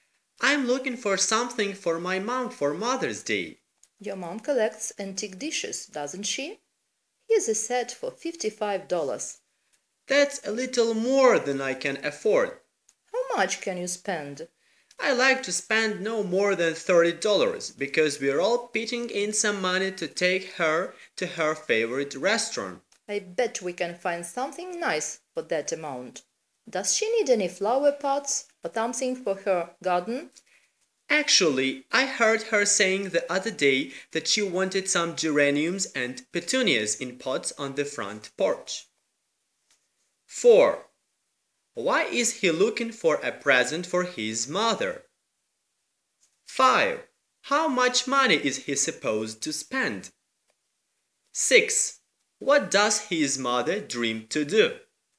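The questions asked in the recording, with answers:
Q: Why is he looking for a present for his mother?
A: For Mother's Day

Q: How much money is he supposed to spend?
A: No more than $30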